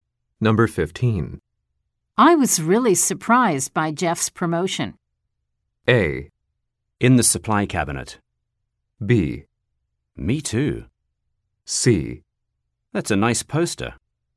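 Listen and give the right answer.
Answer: B: Me too.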